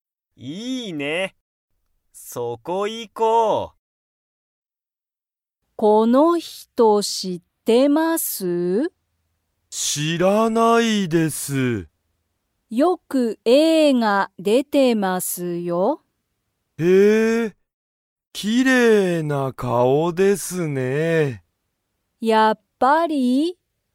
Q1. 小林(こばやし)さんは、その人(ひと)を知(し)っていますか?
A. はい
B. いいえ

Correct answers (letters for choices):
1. B

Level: Level 1